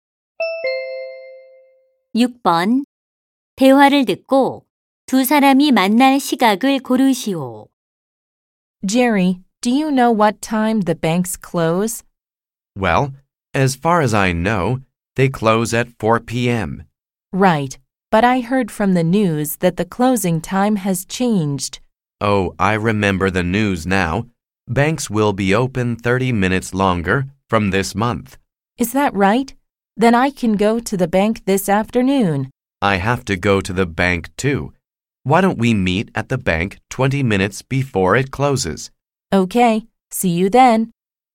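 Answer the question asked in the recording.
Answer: 오후 4시 10분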